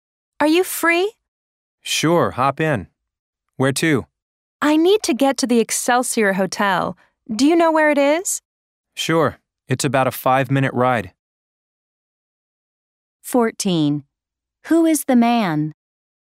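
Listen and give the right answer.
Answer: A taxi driver.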